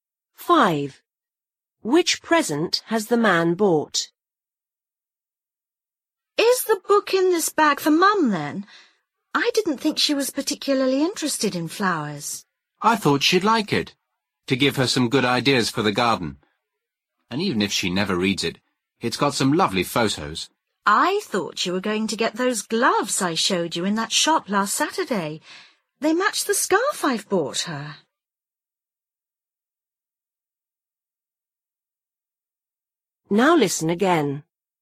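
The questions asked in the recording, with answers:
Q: Which present has the man bought?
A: A book about gardens/flowers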